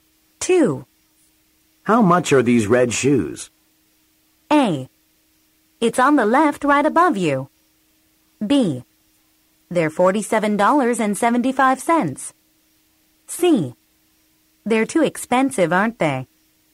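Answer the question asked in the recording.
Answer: B: They're $47.75.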